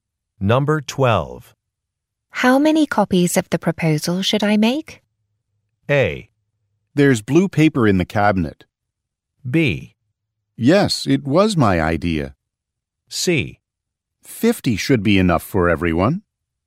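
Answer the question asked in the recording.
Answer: C: 50 should be enough for everyone.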